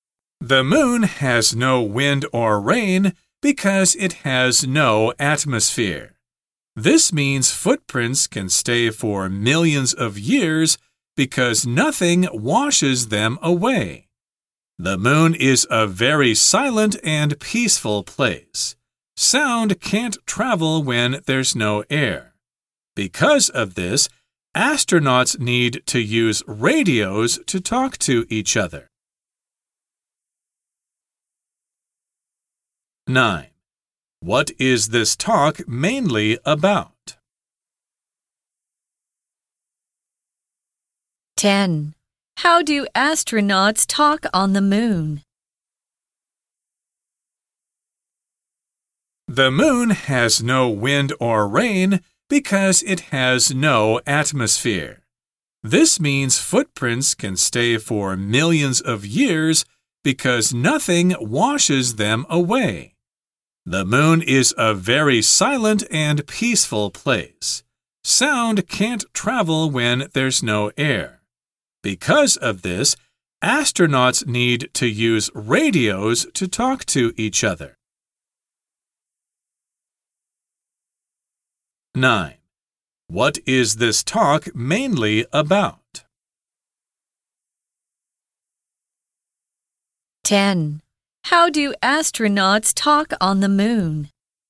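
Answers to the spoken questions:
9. The moon
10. They use radios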